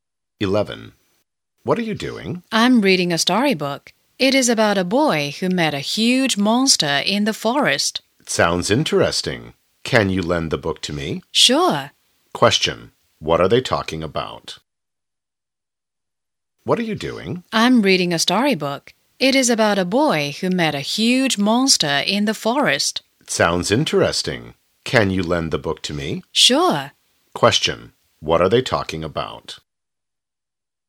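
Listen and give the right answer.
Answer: A storybook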